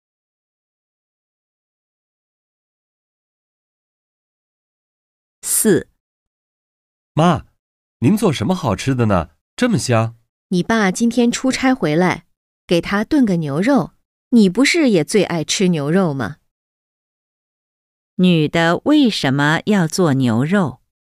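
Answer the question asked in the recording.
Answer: 爸爸今天出差回来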